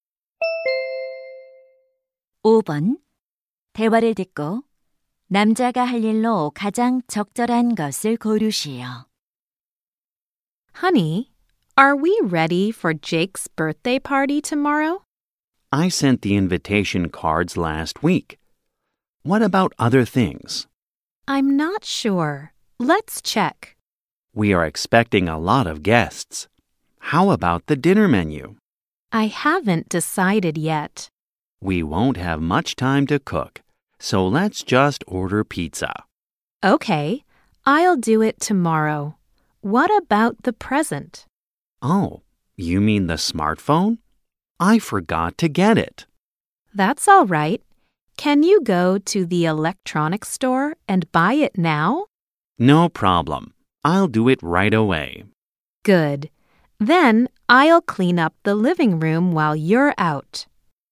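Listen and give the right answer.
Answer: 전자제품 매장에 가서 스마트폰 선물 사기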